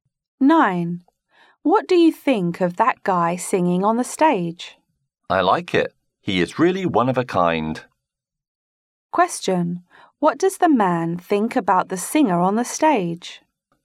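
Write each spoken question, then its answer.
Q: What does the man think about the singer on the stage?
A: He is unique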